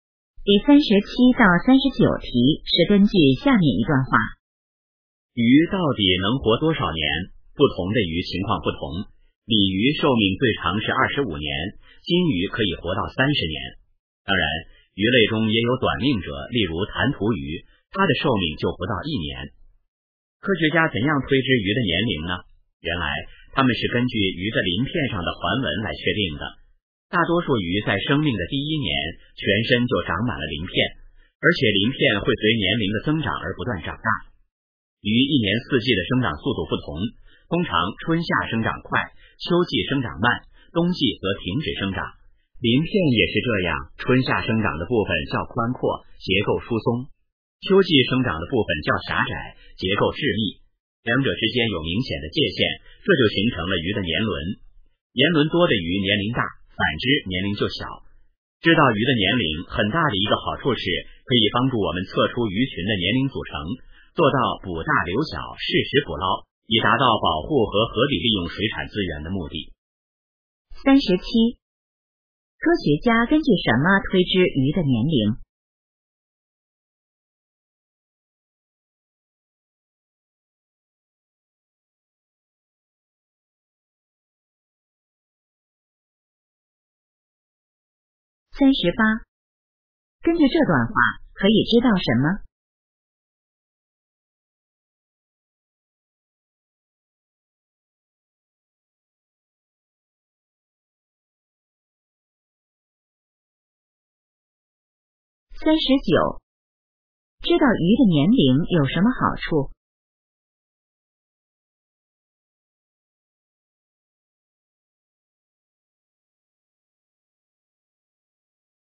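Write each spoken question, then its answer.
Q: 科学家根据什么推知鱼的年龄?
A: 鱼鳞片上的环纹

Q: 知道鱼的年龄有什么好处?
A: 能测出鱼群年龄组成,捕大留小,保护和合理利用水产资源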